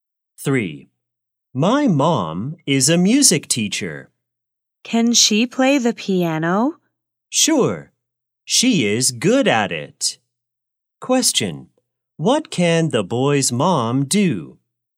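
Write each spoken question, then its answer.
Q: What can the boy's mom do?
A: Play the piano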